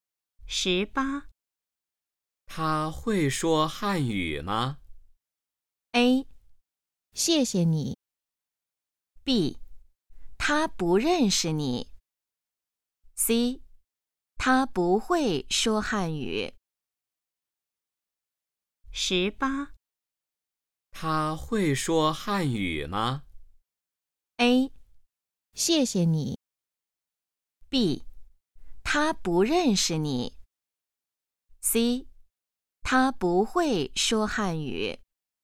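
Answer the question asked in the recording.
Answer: C: 他不会说汉语。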